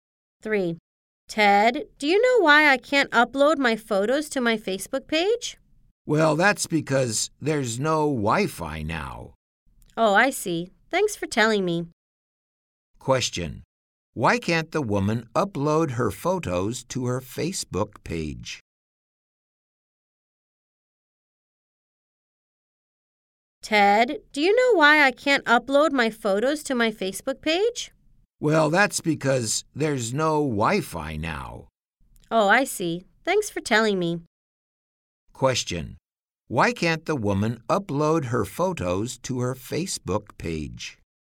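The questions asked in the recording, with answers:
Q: Why can't the woman upload her photos to her Facebook page?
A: Because there's no Wi-Fi now.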